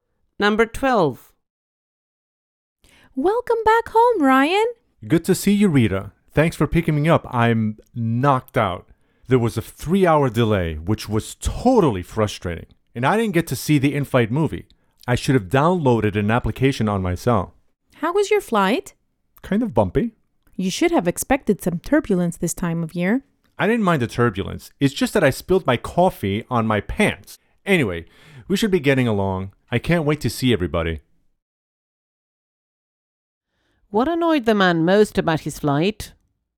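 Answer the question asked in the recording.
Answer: He spilled coffee on his pants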